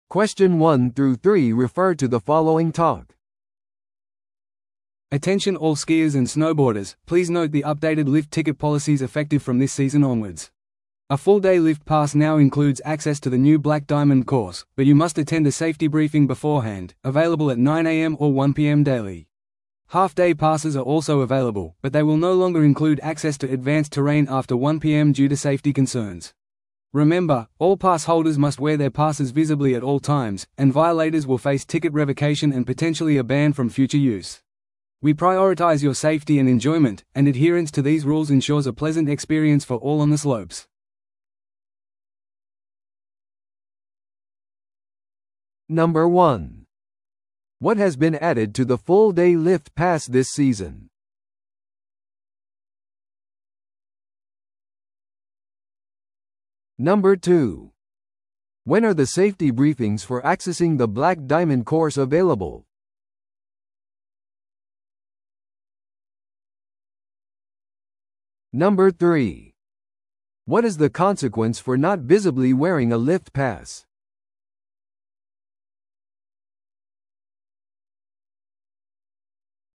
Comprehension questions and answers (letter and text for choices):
Listen to the audio below and answer the questions.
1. What has been added to the full-day lift pass this season?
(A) 午後1時以降の全ての地形へのアクセス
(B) 無料のスキーレッスン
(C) 新しいブラックダイヤモンドコースへのアクセス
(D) 無料のレンタル用具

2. When are the safety briefings for accessing the Black Diamond course available?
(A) 午前9時と午後2時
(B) 午前9時と午後1時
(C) 午前10時と午後3時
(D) 午前8時と正午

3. What is the consequence for not visibly wearing a lift pass?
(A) 罰金が科せられます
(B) 新しいパスを購入する必要があります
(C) リゾートから退去させられます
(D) 券の取り消しと潜在的な禁止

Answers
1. (C) 新しいブラックダイヤモンドコースへのアクセス
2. (B) 午前9時と午後1時
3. (D) 券の取り消しと潜在的な禁止

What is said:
Attention all skiers and snowboarders, please note the updated lift ticket policies effective from this season onwards. A full-day lift pass now includes access to the new Black Diamond course, but you must attend a safety briefing beforehand, available at 9am or 1pm daily. Half-day passes are also available, but they will no longer include access to advanced terrain after 1pm due to safety concerns. Remember, all pass holders must wear their passes visibly at all times, and violators will face ticket revocation and potentially a ban from future use. We prioritize your safety and enjoyment, and adherence to these rules ensures a pleasant experience for all on the slopes.